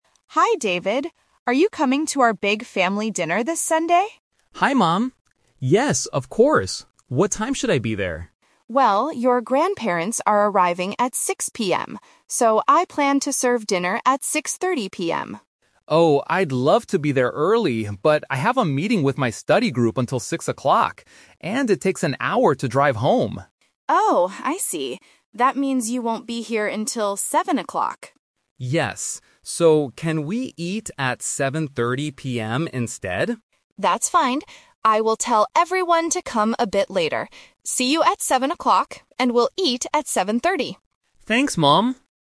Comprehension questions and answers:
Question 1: What time will the family eat dinner?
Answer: 7:30 PM

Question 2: Why will David be late?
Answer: He has to meet his study group.

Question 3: What time will David arrive at his mother's house?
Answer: 7:00 PM

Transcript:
Mother: Hi David. Are you coming to our big family dinner this Sunday?
David: Hi Mom. Yes, of course. What time should I be there?
Mother: Well, your grandparents are arriving at 6:00 PM. So, I plan to serve dinner at 6:30 PM.
David: Oh, I'd love to be there early, but I have a meeting with my study group until 6:00. And it takes an hour to drive home.
Mother: Oh, I see. That means you won't be here until 7:00.
David: Yes. So, can we eat at 7:30 PM instead?
Mother: That's fine. I will tell everyone to come a bit later. See you at 7:00, and we'll eat at 7:30.